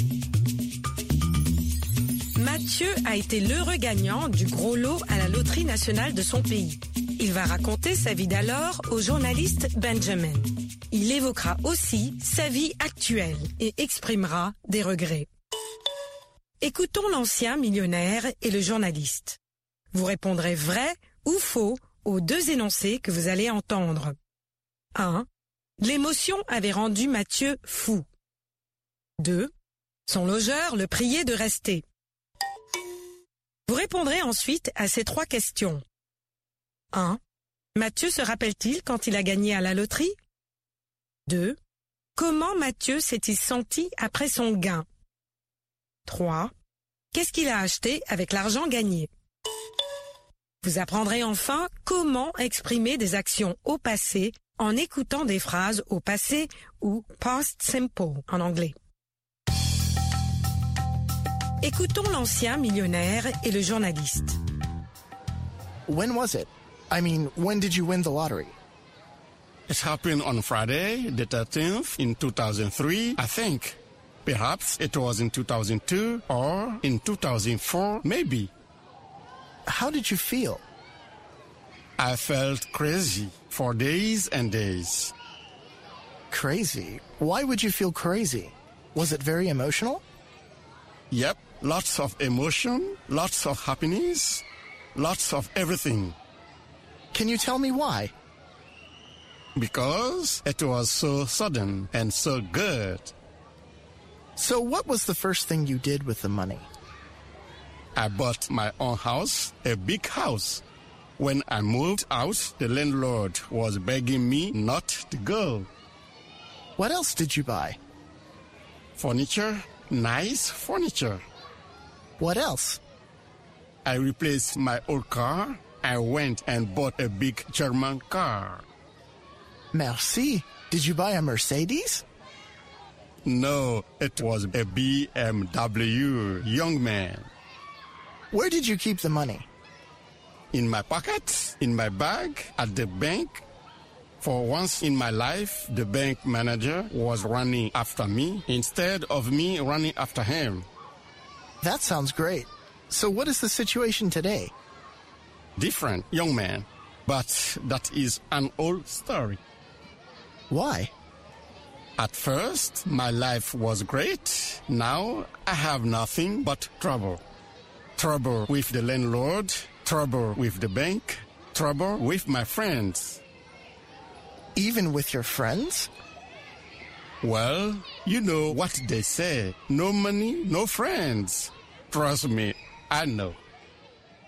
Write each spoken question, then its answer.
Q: Mathieu se rappelle-t-il quand il a gagné à la loterie?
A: Non.

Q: Son logeur le priait de rester.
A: L'énoncé 2 est vrai. Son logeur l'a prié de rester.

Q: Qu'est-ce qu'il a acheté avec l'argent gagné?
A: Une maison, des meubles et une voiture.